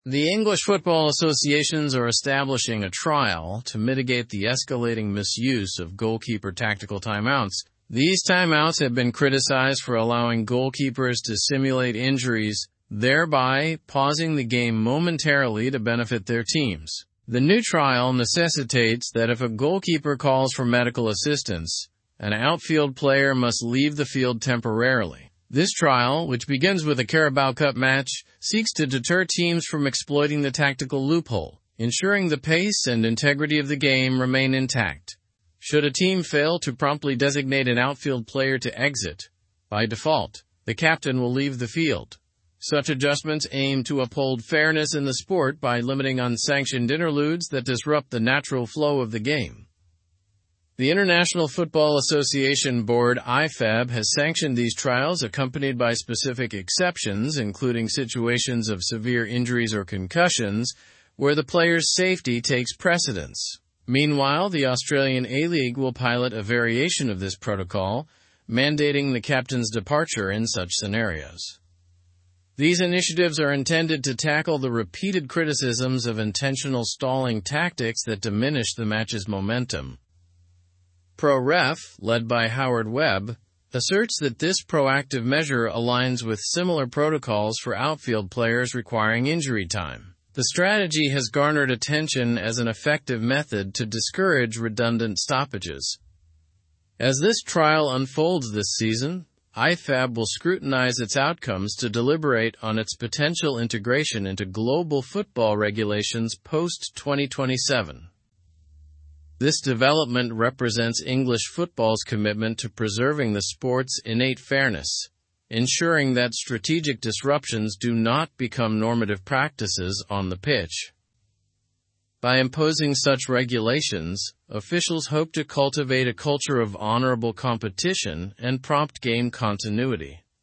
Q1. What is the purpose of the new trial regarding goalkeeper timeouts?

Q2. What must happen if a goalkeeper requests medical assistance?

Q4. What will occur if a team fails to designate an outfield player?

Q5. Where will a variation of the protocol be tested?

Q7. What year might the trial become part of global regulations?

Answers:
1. To mitigate the misuse of tactical timeouts in football.
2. An outfield player must temporarily leave the field.
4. The captain will automatically leave the field.
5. In the Australian A-League.
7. Post-2027.

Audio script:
The English football associations are establishing a trial to mitigate the escalating misuse of goalkeeper tactical timeouts. These timeouts have been criticized for allowing goalkeepers to simulate injuries, thereby pausing the game momentarily to benefit their teams. The new trial necessitates that if a goalkeeper calls for medical assistance, an outfield player must leave the field temporarily. This trial, which begins with a Carabao Cup match, seeks to deter teams from exploiting the tactical loophole, ensuring the pace and integrity of the game remain intact. Should a team fail to promptly designate an outfield player to exit, by default, the captain will leave the field. Such adjustments aim to uphold fairness in the sport by limiting unsanctioned interludes that disrupt the natural flow of the game. The International Football Association Board (Ifab) has sanctioned these trials, accompanied by specific exceptions, including situations of severe injuries or concussions, where the player's safety takes precedence. Meanwhile, the Australian A-League will pilot a variation of this protocol, mandating the captain's departure in such scenarios. These initiatives are intended to tackle the repeated criticisms of intentional stalling tactics that diminish the match's momentum. Pro Ref, led by Howard Webb, asserts that this proactive measure aligns with similar protocols for outfield players requiring injury time. The strategy has garnered attention as an effective method to discourage redundant stoppages. As this trial unfolds this season, Ifab will scrutinize its outcomes to deliberate on its potential integration into global football regulations post-2027. This development represents English football's commitment to preserving the sport's innate fairness, ensuring that strategic disruptions do not become normative practices on the pitch. By imposing such regulations, officials hope to cultivate a culture of honourable competition and prompt game continuity.

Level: Level 4